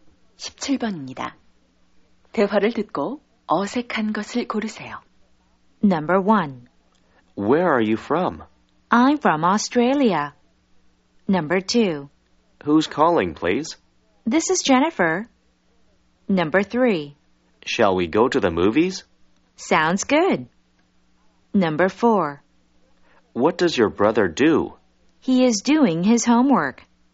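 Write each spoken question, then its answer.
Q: 대화를 듣고 어색한 것을 고르세요.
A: 4: What does your brother do? / He is doing his homework.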